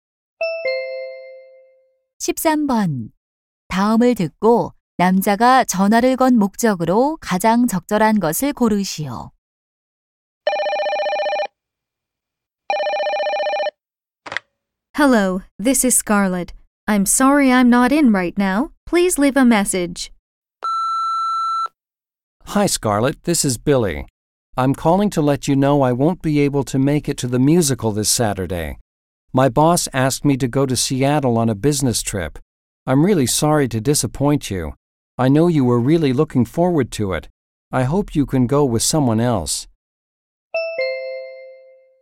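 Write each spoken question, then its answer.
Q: 다음을 듣고 남자가 전화를 건 목적으로 가장 적절한 것을 고르시오.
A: 뮤지컬 약속 취소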